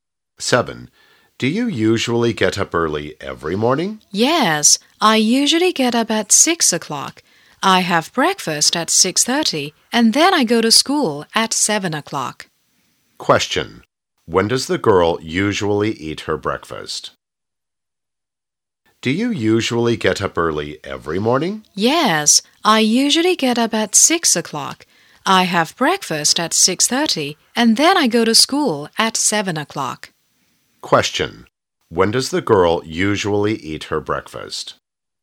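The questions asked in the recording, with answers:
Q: When does the girl usually eat her breakfast?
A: At 6:30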